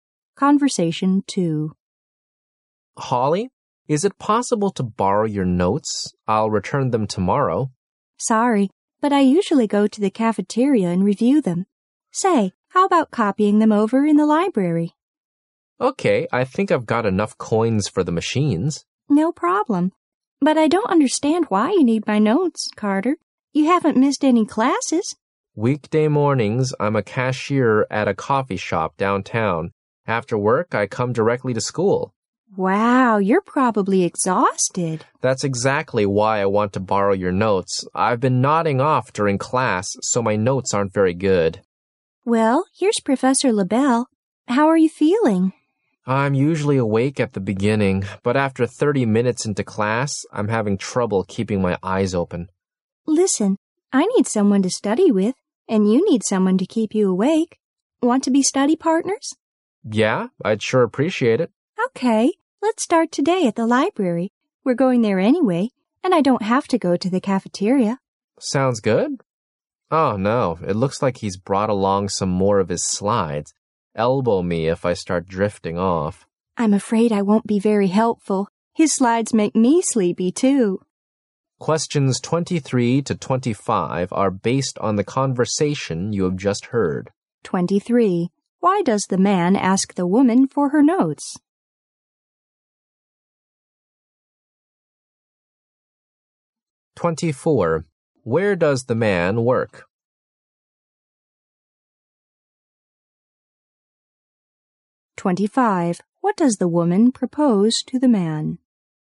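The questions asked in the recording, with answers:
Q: Why does the man ask the woman for her notes?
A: He has been falling asleep in class, so his notes aren't good

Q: Where does the man work?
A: At a coffee shop downtown

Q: What does the woman propose to the man?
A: That they become study partners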